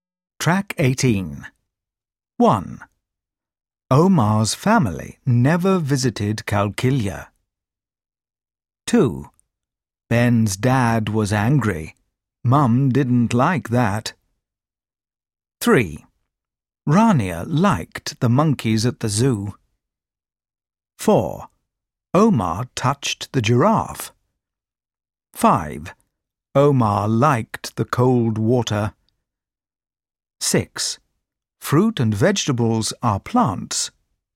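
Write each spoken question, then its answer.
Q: Omar's family never visited Qalqilya.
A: False

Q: Rania liked the monkeys at the zoo.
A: False

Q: Omar liked the cold water.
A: False

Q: Fruit and vegetables are plants.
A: True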